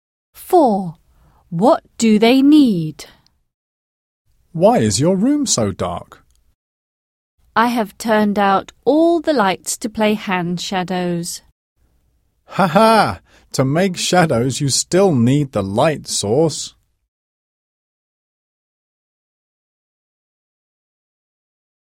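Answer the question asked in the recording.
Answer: a light source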